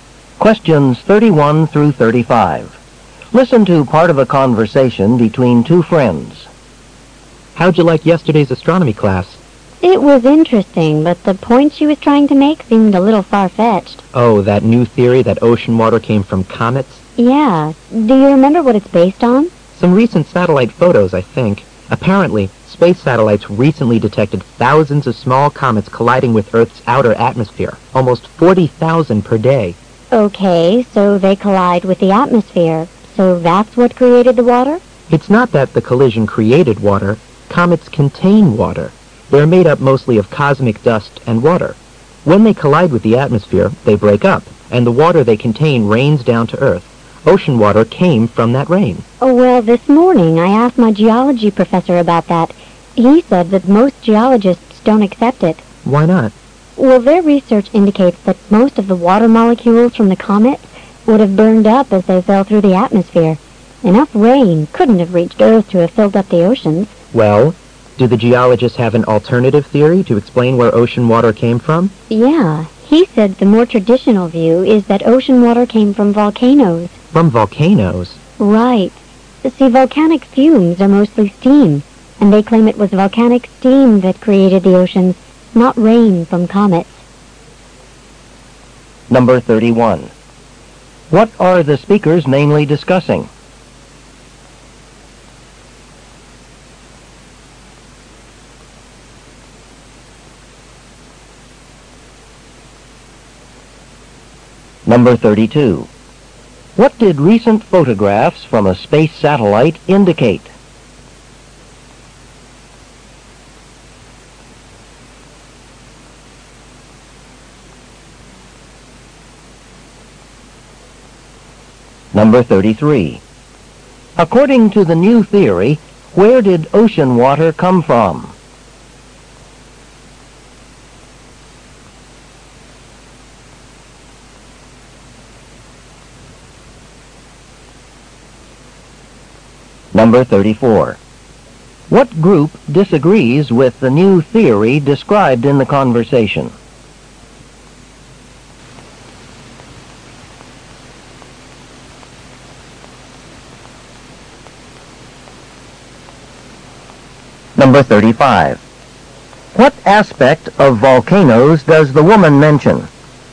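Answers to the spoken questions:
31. Theories about where ocean water came from
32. Thousands of small comets collide with Earth's outer atmosphere daily
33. Rain from comets' water
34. Most geologists
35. Their fumes are mostly steam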